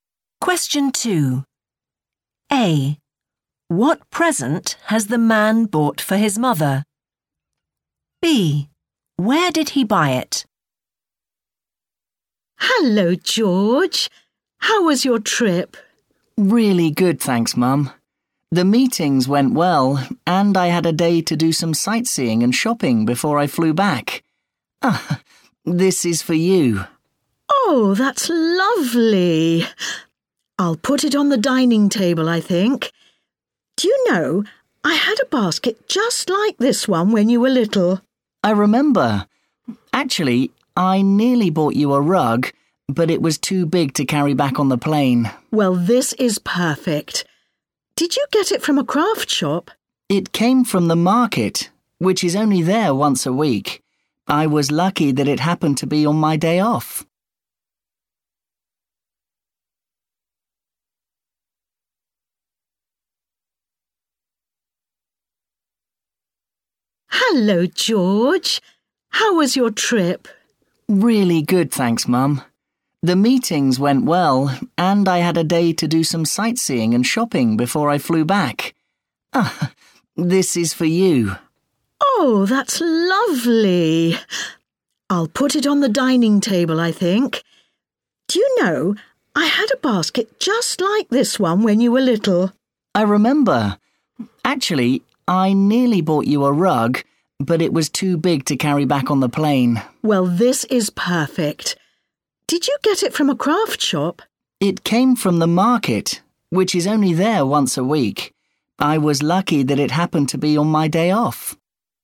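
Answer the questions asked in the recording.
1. a basket
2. the market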